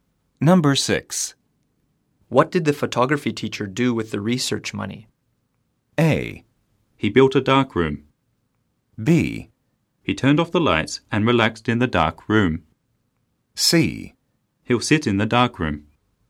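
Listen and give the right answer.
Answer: A: He built a dark room.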